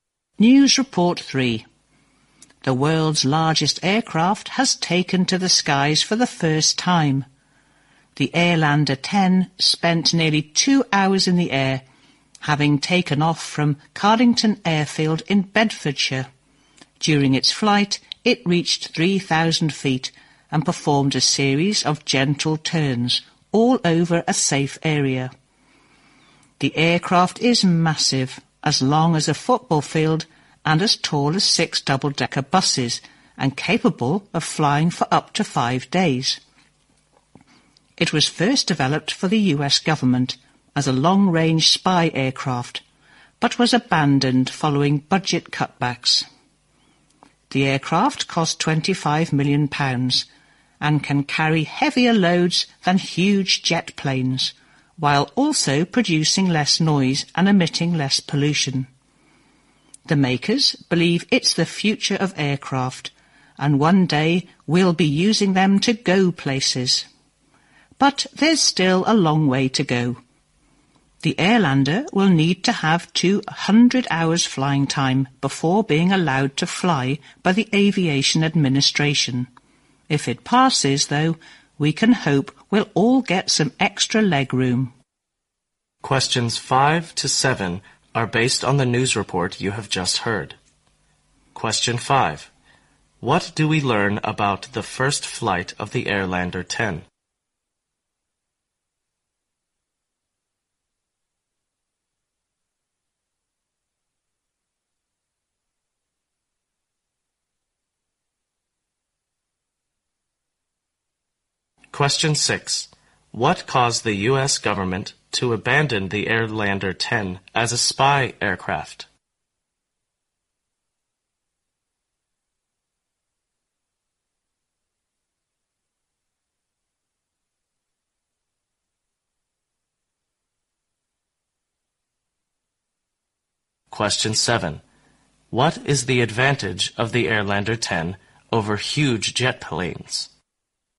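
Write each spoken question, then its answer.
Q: What do we learn about the first flight of the Airlander 10?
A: It lasted nearly 2 hours, reaching 3,000 feet with gentle turns over a safe area.

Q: What caused the U.S. government to abandon the Airlander 10 as a spy aircraft?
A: Budget cutbacks.

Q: What is the advantage of the Airlander 10 over huge jet planes?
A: It can carry heavier loads, with less noise and less pollution.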